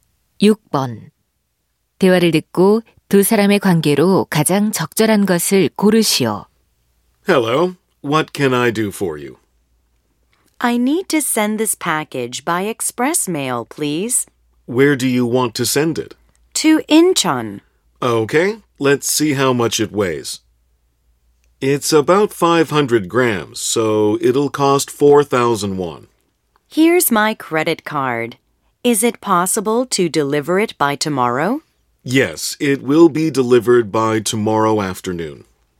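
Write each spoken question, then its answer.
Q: 대화를 듣고 두 사람의 관계로 가장 적절한 것을 고르시오.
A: 우체국 직원 - 손님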